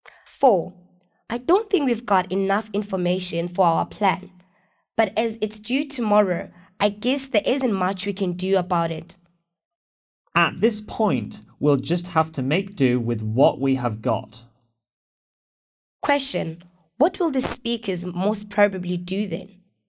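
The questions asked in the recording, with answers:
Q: What will the speakers most probably do then?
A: Finish the plan with the information they have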